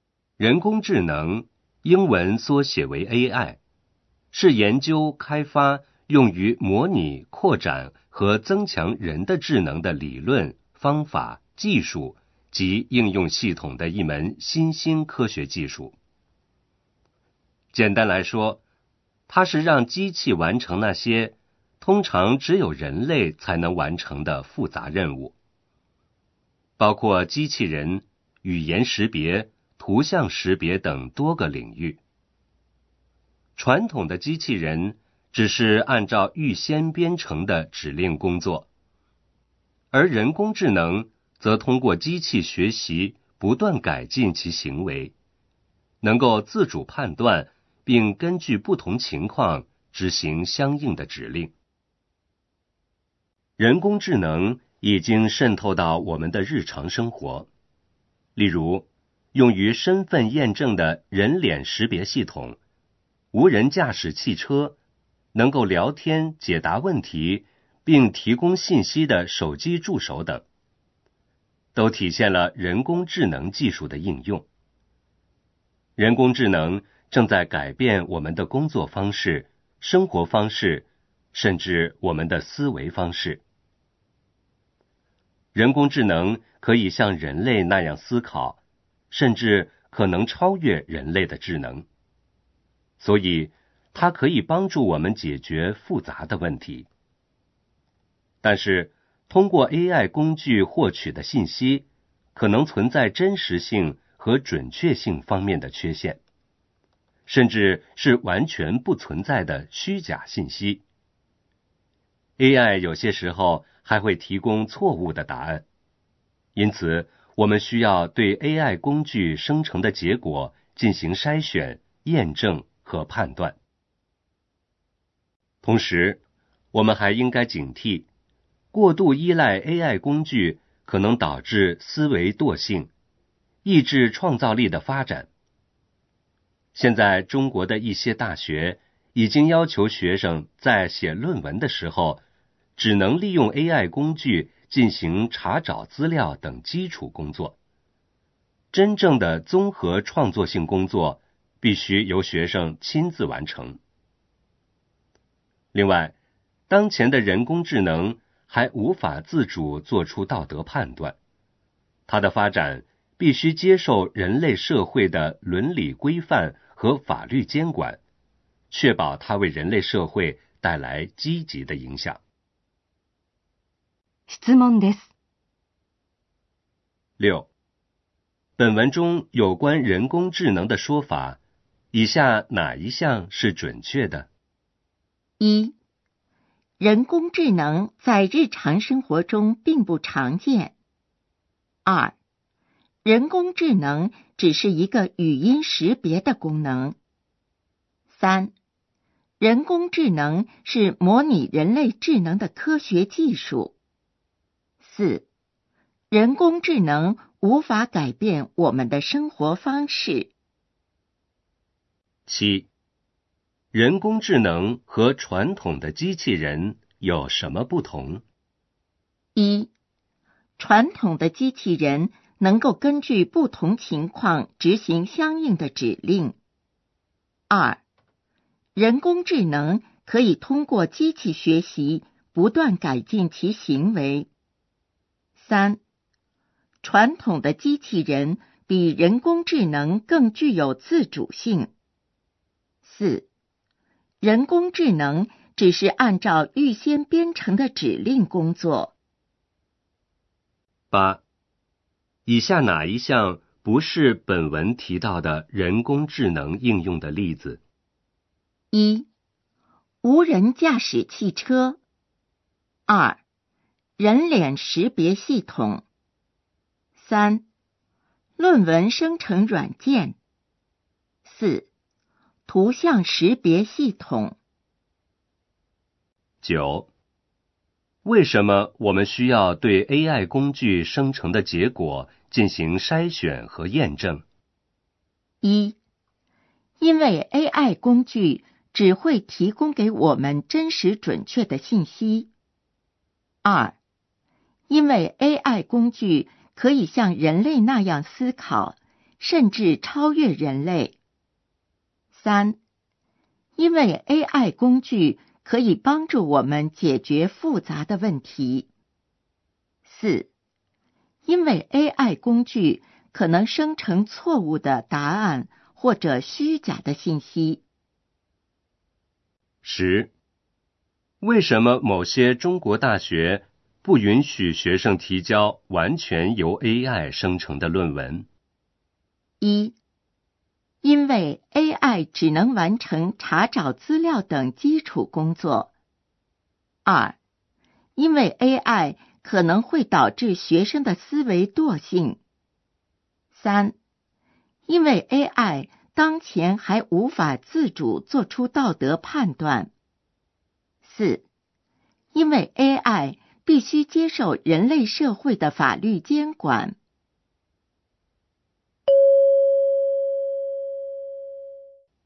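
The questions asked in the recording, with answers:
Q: 本文中有关人工智能的说法,以下哪一项是准确的?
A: 3: 人工智能是模拟人类智能的科学技术。

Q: 人工智能和传统的机器人有什么不同?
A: 2: 人工智能可以通过机器学习不断改进其行为。

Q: 以下哪一项不是本文提到的人工智能应用的例子?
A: 3: 论文生成软件。

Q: 为什么我们需要对 AI 工具生成的结果进行筛选和验证?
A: 4: 因为 AI 工具可能生成错误的答案或者虚假的信息。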